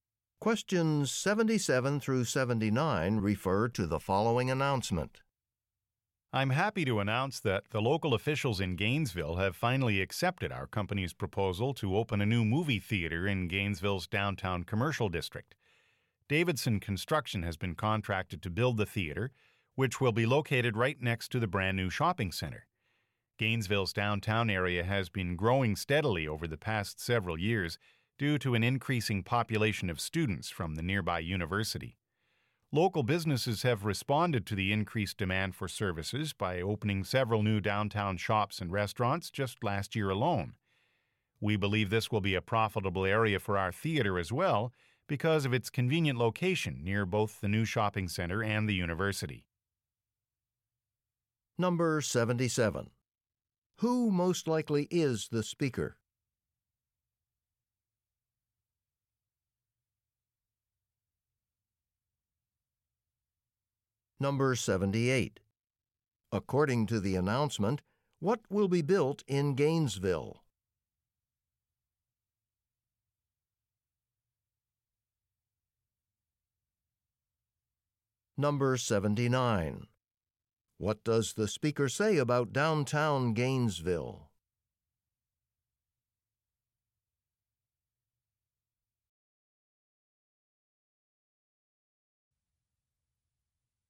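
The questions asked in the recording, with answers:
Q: According to the announcement, what will be built in Gainesville?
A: A new movie theater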